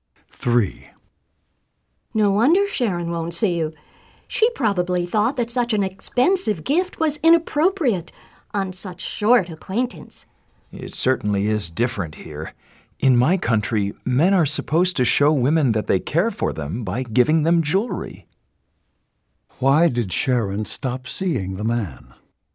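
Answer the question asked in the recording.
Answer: He gave her an expensive gift (jewelry) too soon.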